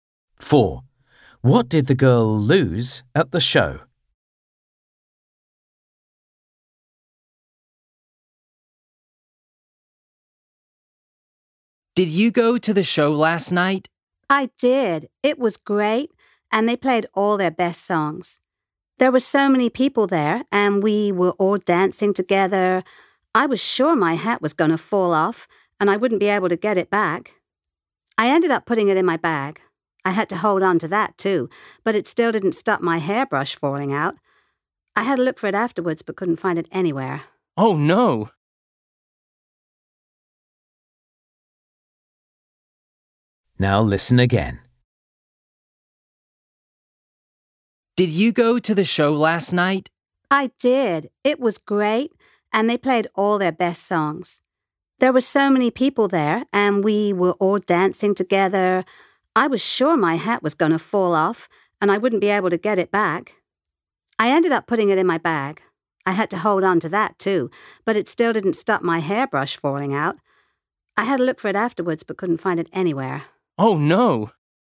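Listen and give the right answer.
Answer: her hairbrush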